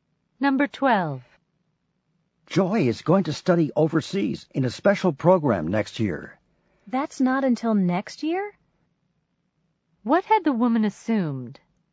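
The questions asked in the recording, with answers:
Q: What had the woman assumed?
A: That Joy was going overseas sooner, this year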